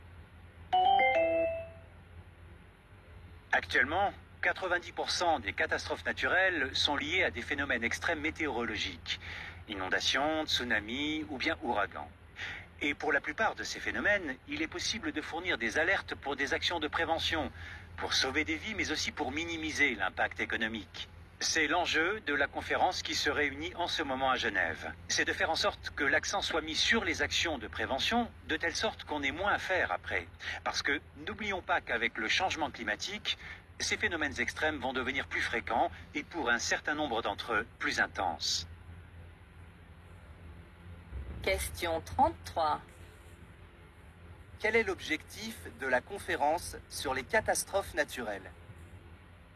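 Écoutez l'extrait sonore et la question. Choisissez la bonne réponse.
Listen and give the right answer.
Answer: Mettre l'accent sur la prévention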